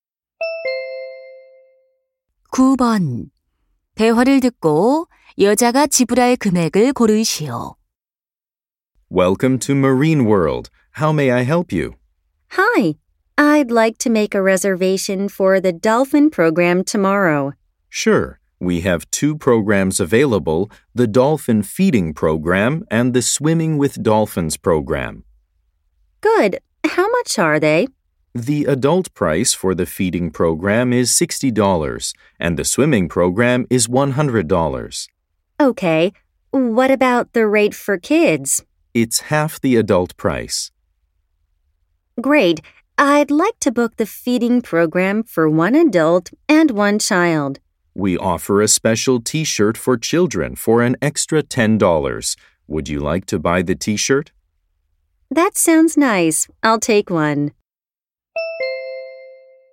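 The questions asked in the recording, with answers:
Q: 대화를 듣고 여자가 지불할 금액을 고르시오.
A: $100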